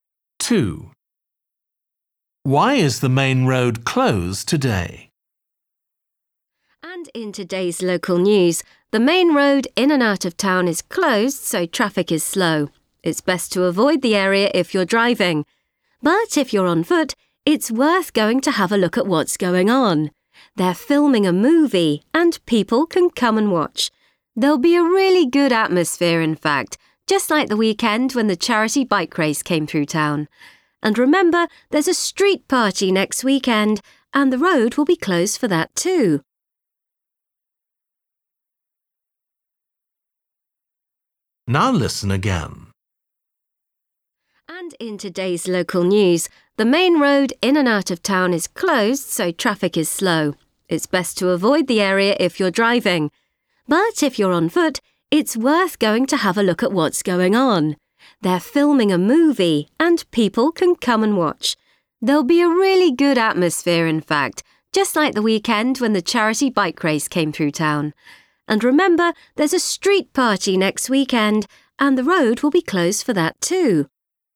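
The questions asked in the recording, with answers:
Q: Why is the main road closed today?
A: They're filming a movie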